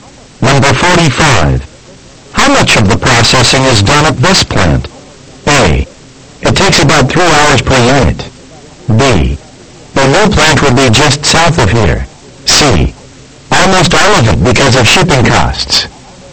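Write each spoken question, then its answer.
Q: How much of the processing is done at this plant?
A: C: Almost all of it because of shipping costs.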